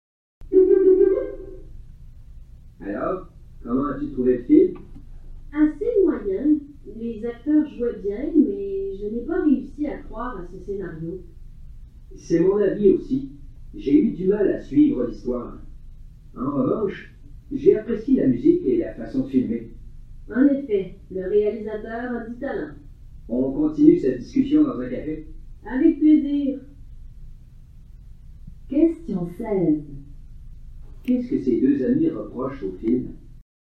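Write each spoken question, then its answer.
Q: Qu'est-ce que ces deux amis reprochent au film ?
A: Le scénario, l'histoire peu crédible et difficile à suivre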